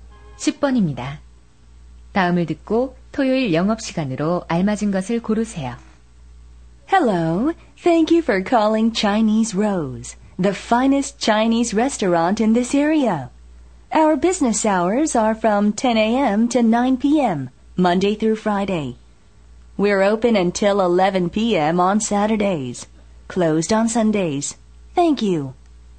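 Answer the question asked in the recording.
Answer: 오전 10시부터 오후 11시까지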